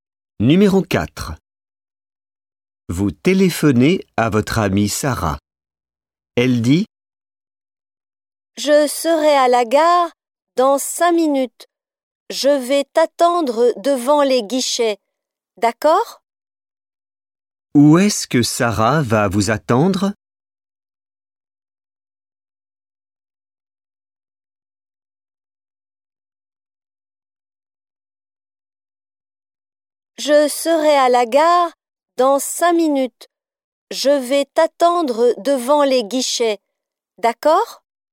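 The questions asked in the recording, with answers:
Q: Où est-ce que Sarah va vous attendre?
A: devant les guichets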